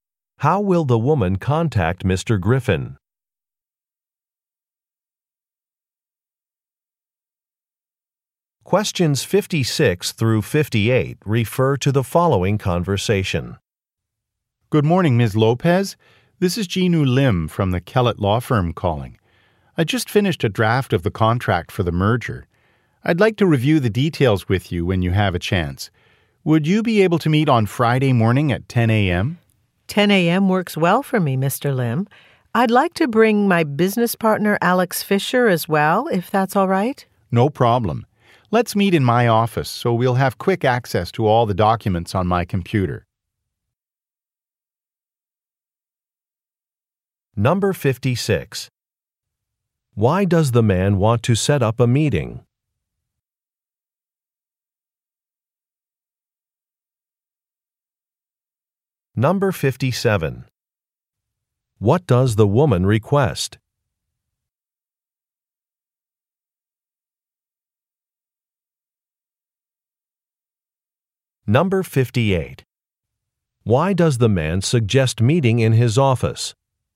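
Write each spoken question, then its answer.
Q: Why does the man want to set up a meeting?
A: To review a draft of the merger contract

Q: What does the woman request?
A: To bring her business partner

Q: Why does the man suggest meeting in his office?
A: For quick access to documents on his computer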